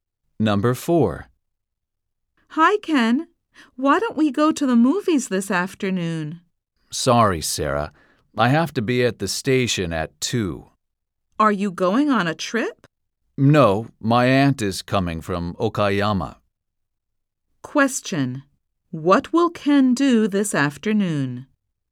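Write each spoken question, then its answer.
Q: what will Ken do this afternoon?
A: Go to the station to meet his aunt from Okayama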